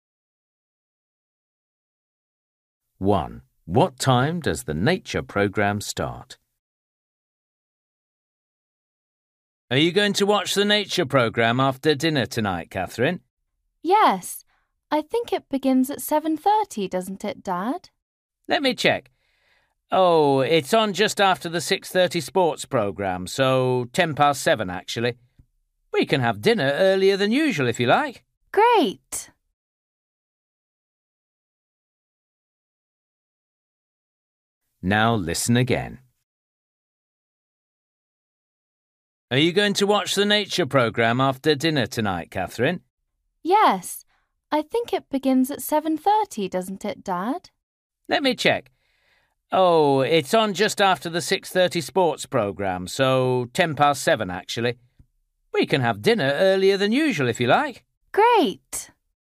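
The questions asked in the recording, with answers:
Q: What time does the nature program start?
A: 7:10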